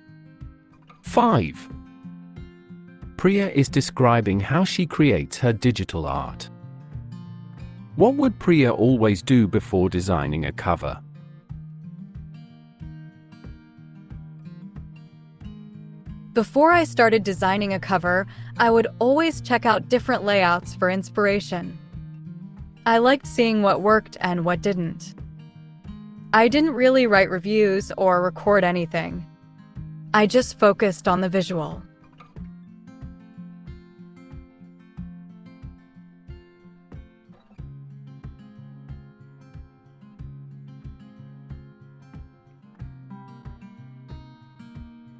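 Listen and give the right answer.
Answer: check out different layouts for inspiration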